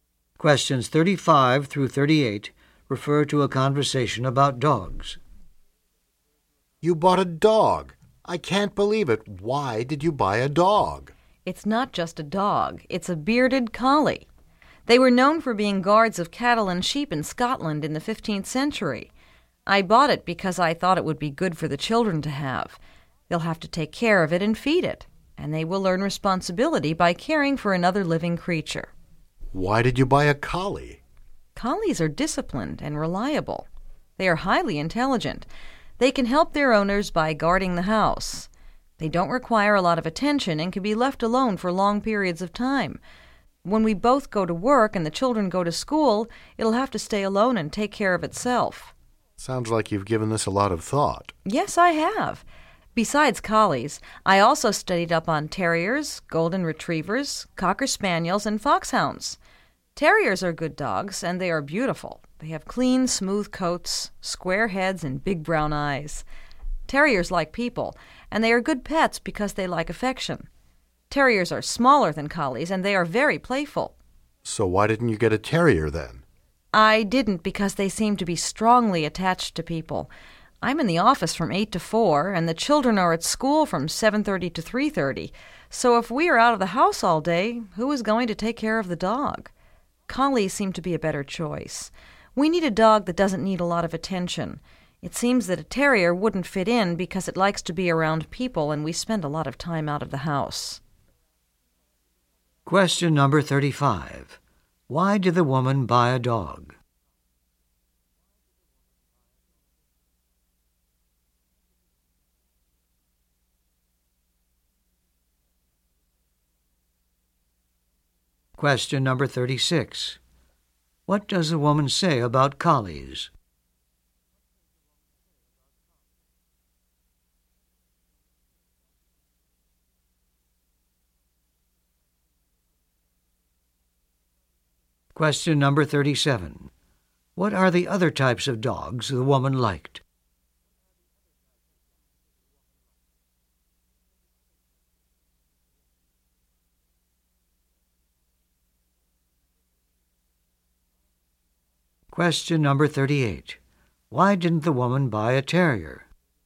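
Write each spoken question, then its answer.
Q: Why did the woman buy a dog?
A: To teach the children responsibility

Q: What does the woman say about collies?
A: They are disciplined, reliable, intelligent and can be left alone

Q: Why didn't the woman buy a terrier?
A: Terriers need people around and the family is out all day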